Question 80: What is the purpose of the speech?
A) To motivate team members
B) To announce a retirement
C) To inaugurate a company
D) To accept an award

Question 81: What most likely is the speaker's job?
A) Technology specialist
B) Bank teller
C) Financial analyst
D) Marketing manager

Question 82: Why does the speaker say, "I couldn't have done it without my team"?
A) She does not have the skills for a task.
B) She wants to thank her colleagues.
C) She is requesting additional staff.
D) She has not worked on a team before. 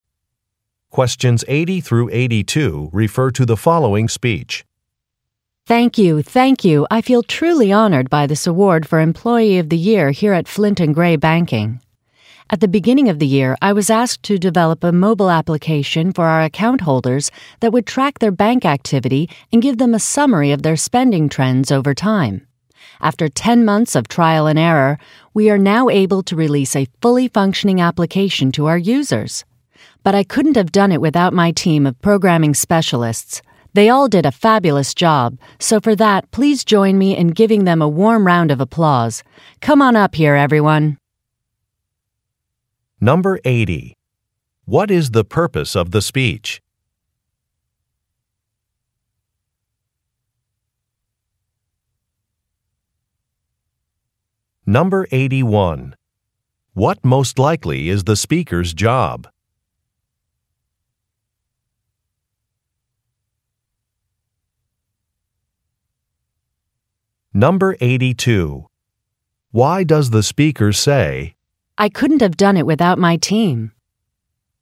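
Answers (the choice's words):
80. To accept an award
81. Technology specialist
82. She wants to thank her colleagues.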